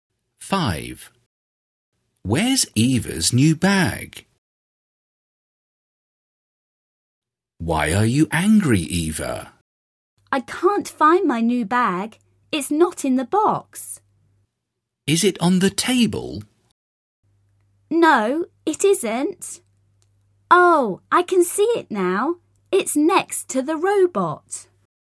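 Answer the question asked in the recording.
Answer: Next to the robot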